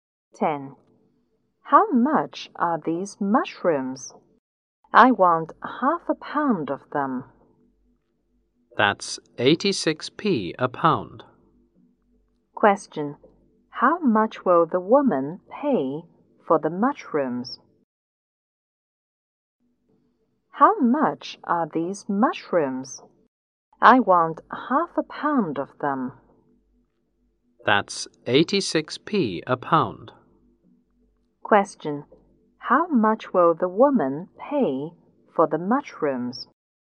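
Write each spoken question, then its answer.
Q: How much will the woman pay for the mushrooms?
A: 43p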